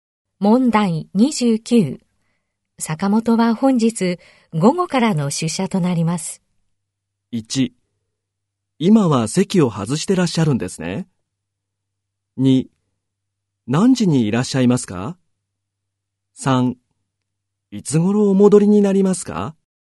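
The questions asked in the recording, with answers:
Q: 坂本は本日午後からの出社となります。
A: 2: 何時にいらっしゃいますか?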